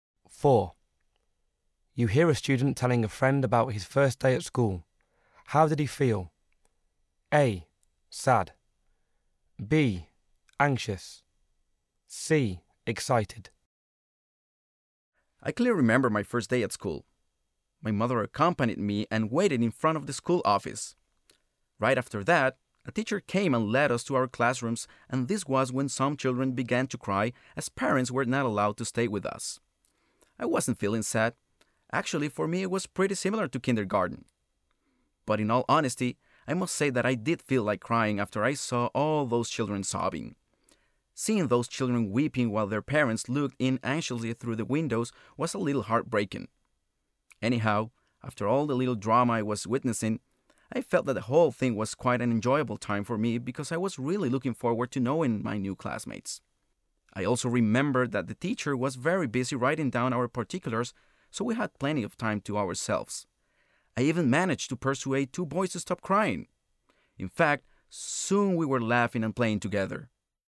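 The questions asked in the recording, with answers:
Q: How did he feel?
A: C: Excited.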